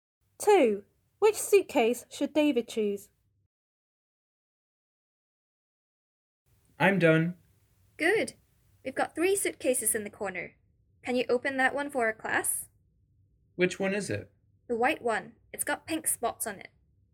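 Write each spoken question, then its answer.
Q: Which suitcase should David choose?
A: The white one with pink spots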